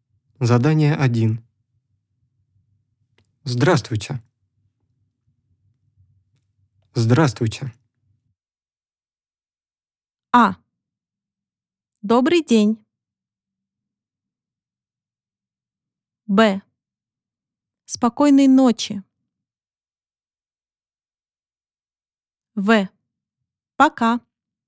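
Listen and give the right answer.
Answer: А: Добрый день.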